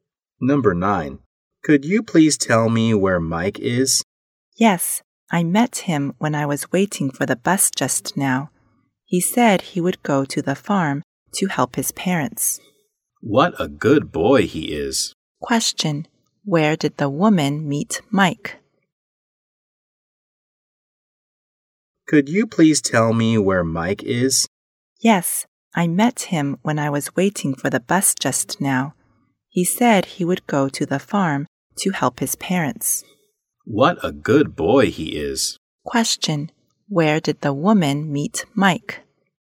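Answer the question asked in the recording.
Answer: At the bus stop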